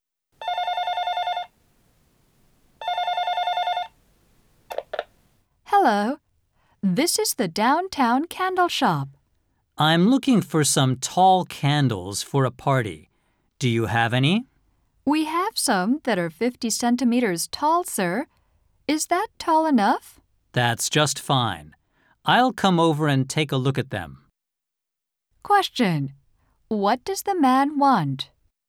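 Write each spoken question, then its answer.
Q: What does the man want?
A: Tall candles for a party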